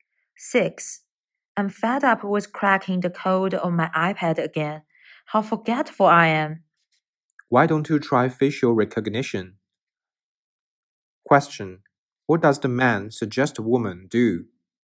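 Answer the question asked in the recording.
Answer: Use facial recognition to unlock her iPad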